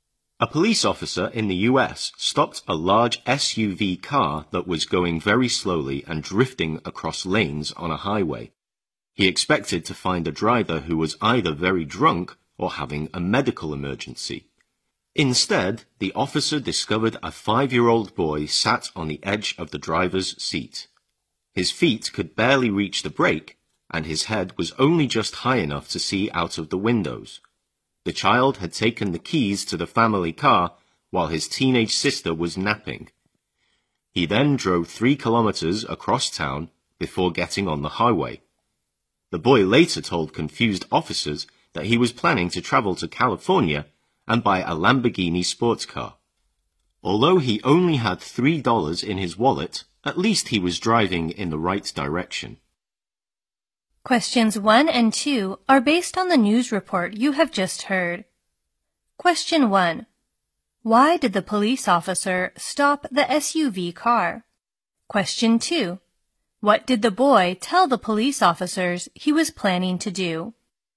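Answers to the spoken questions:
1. It was going very slowly and drifting across lanes on a highway
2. Travel to California and buy a Lamborghini sports car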